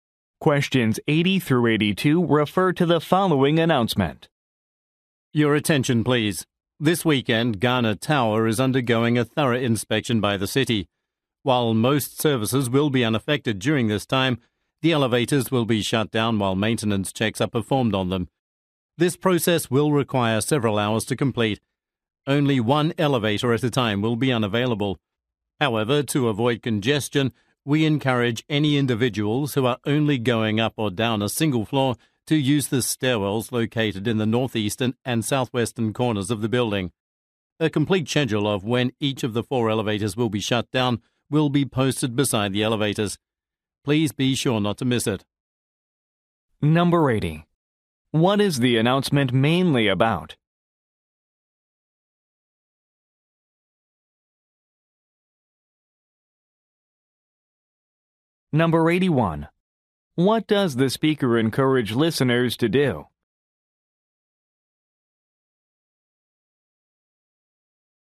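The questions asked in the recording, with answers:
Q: What is the announcement mainly about?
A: Building inspection and elevator shutdowns

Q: What does the speaker encourage listeners to do?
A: Use the stairs when going one floor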